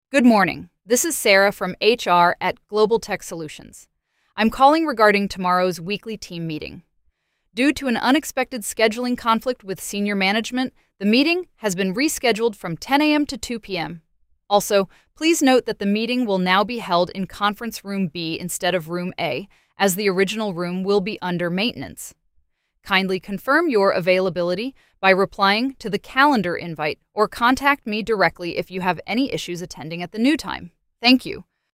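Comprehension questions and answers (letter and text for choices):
What are the two main changes mentioned in the call?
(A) The meeting was canceled and moved to another day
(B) The meeting time and location were changed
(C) The meeting agenda and participants were changed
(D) The meeting was shortened and moved online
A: (B) The meeting time and location were changed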